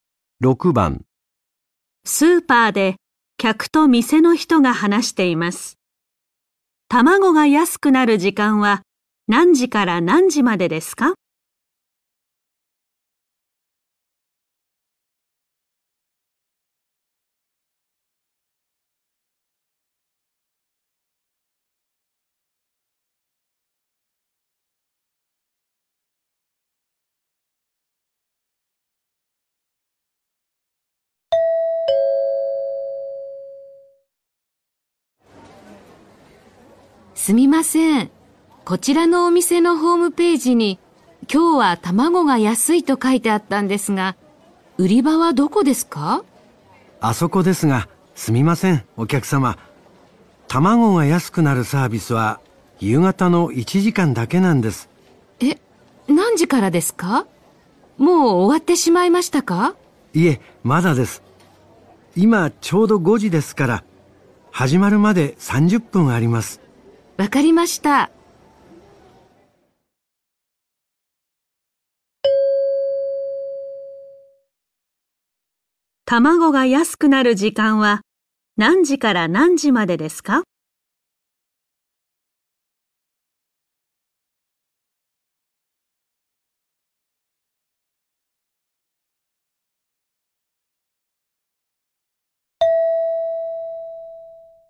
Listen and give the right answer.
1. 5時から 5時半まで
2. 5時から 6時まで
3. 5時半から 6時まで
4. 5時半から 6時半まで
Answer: 4. 5時半から 6時半まで

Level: N4 Listening · Test 1